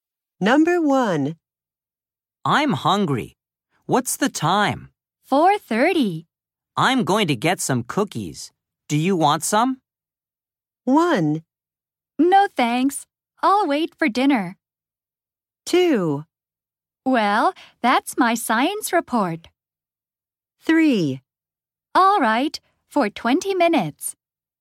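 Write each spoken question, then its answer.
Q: Do you want some?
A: 1: No thanks. I'll wait for dinner.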